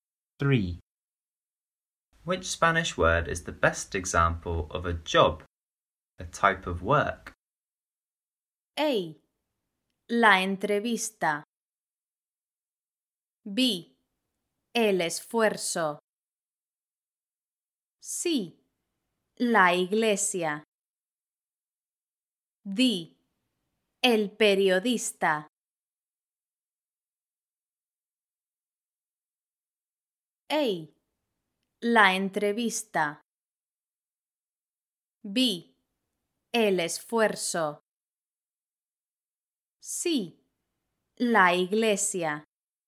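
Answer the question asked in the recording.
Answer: D: El periodista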